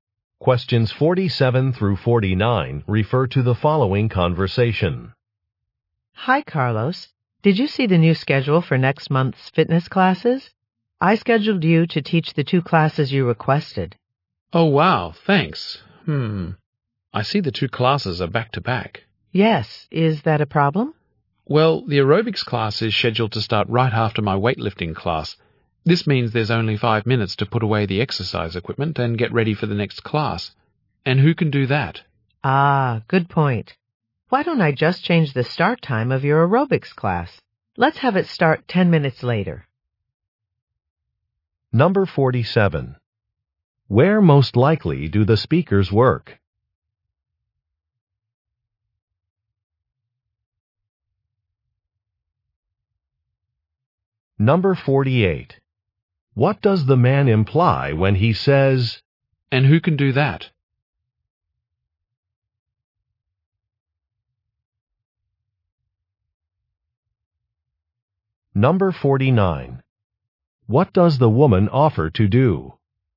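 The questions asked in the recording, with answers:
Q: Where most likely do the speakers work?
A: At a fitness center

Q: What does the man imply when he says,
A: Five minutes is not enough time to prepare for the next class

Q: What does the woman offer to do?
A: Start his aerobics class 10 minutes later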